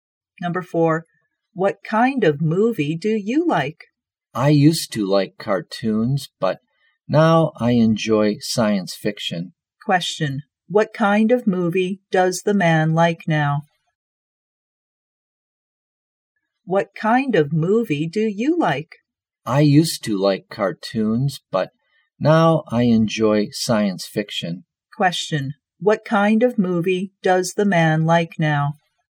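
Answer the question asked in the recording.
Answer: Science fiction.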